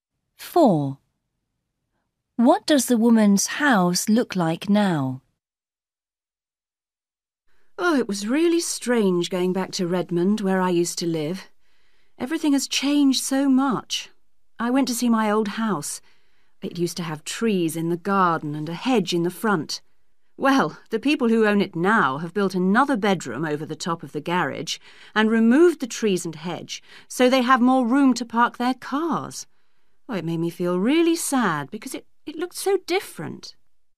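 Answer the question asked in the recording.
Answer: an extra bedroom over the garage, with no trees or hedge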